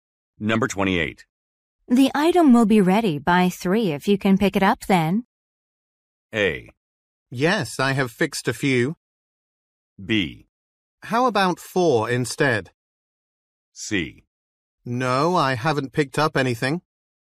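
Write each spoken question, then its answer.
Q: The item will be ready by 3 if you can pick it up then.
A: B: How about 4 instead?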